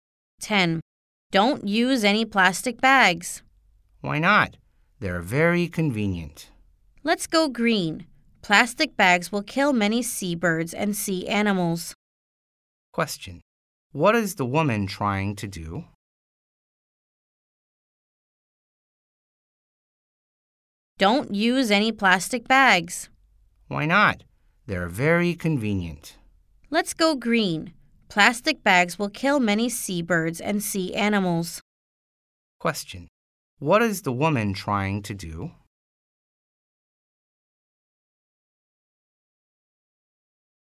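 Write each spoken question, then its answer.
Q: What is the woman trying to do?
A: Persuade the man to go green and not use plastic bags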